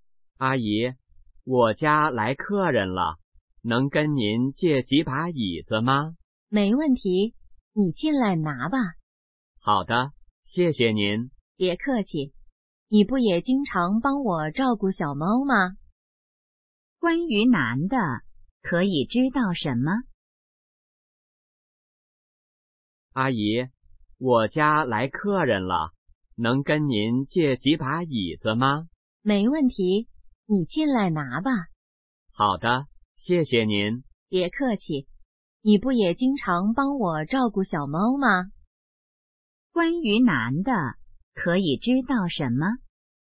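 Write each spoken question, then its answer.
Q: 关于男的,可以知道什么?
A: 经常帮阿姨照顾小猫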